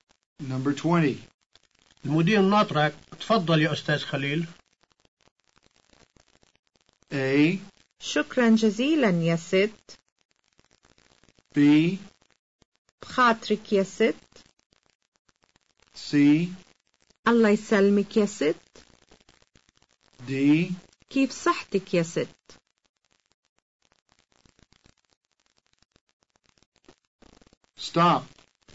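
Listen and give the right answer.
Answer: A: شكرا جزيلا يا ست.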